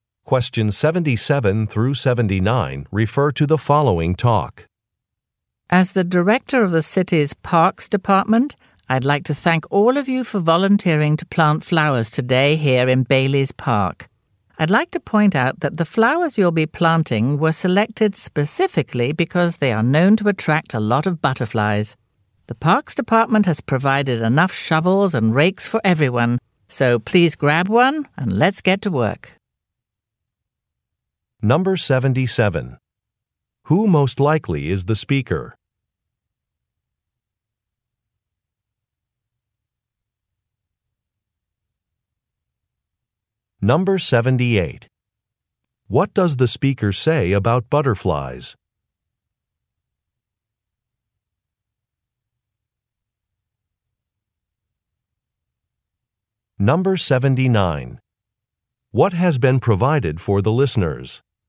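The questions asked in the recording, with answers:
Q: Who most likely is the speaker?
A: The director of the city's Parks Department

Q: What does the speaker say about butterflies?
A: The flowers were chosen because they attract butterflies

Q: What has been provided for the listeners?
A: Shovels and rakes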